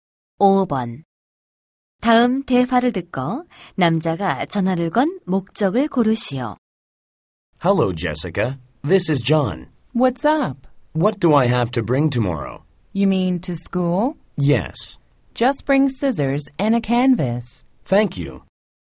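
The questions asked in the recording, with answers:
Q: 다음 대화를 듣고 남자가 전화를 건 목적을 고르시오.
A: 내일 학교에 가져갈 준비물을 물어보려고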